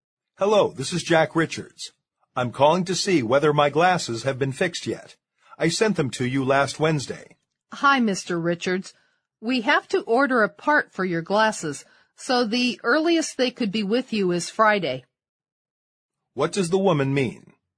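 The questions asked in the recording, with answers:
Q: What does the woman mean?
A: The glasses need a part ordered, so they can't be ready before Friday.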